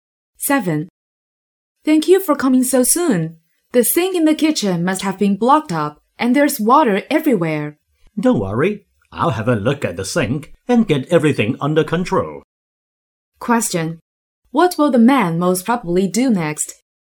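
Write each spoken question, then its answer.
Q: What will the man most probably do next?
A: Check and fix the blocked sink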